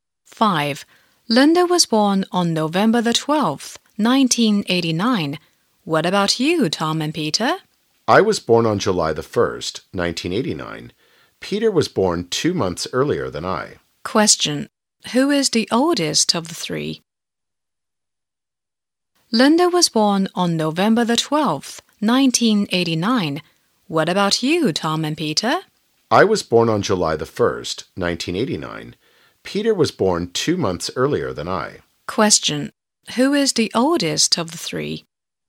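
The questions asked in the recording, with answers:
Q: Who is the oldest of the three?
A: Peter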